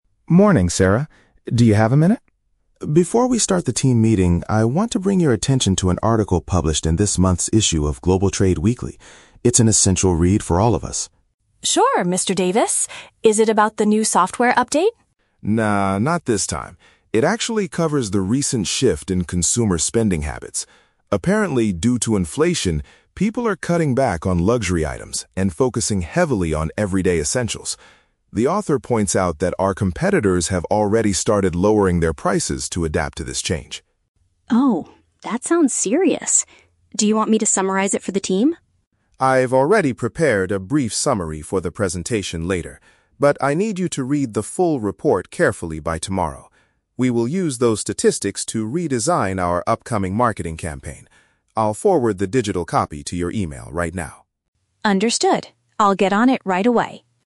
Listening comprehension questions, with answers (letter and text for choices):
Listen to a manager talking to an employee. Choose the correct answer (A, B, or C) for each question.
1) What is the main topic of the magazine article?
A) A recent update to the company's computer system.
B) How the economy is changing what customers buy.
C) The process of hiring new staff for the marketing department.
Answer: B) How the economy is changing what customers buy.

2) What are rival companies currently doing according to the report?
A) They are reducing the cost of their products.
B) They are launching a brand new luxury brand.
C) They are closing down some of their local stores.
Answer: A) They are reducing the cost of their products.

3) What does the manager ask Sarah to do?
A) Write a short summary of the text for the meeting.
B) Print a physical copy of the article for everyone.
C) Study the complete document before the next day.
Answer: C) Study the complete document before the next day.

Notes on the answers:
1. The manager says the article covers the "shift in consumer spending habits" and how people are "cutting back on luxury items". Option B paraphrases this idea. Option A is the Trap: Sarah asks if it is about the "new software update" (computer system), but the manager replies, "No, not this time." Option C is plausible in an office but is never mentioned.
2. The manager explicitly states that "competitors have already started lowering their prices". Option A uses synonyms to express this (rival companies = competitors; reducing the cost = lowering prices). Option B is the Trap: "Luxury items" are mentioned in the audio, but the article says people are cutting back on them, not that competitors are launching them. Option C is not mentioned.
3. The manager tells Sarah: "I need you to read the full report carefully by tomorrow". Option C paraphrases this instruction perfectly (study = read carefully; complete document = full report; before the next day = by tomorrow). Option A is the Trap: Sarah offers to summarize it, but the manager rejects it saying, "I've already prepared a brief summary". Option B is incorrect because he will send her a "digital copy" to her email, not a printed one.

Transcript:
Manager: Morning, Sarah. Do you have a minute? Before we start the team meeting, I want to bring your attention to an article published in this month's issue of Global Trade Weekly. It's an essential read for all of us.
Sarah: Sure, Mr. Davis. Is it about the new software update?
Manager: No, not this time. It actually covers the recent shift in consumer spending habits. Apparently, due to inflation, people are cutting back on luxury items and focusing heavily on everyday essentials. The author points out that our competitors have already started lowering their prices to adapt to this change.
Sarah: Oh, that sounds serious. Do you want me to summarize it for the team?
Manager: I've already prepared a brief summary for the presentation later. But I need you to read the full report carefully by tomorrow. We will use those statistics to redesign our upcoming marketing campaign. I'll forward the digital copy to your email right now.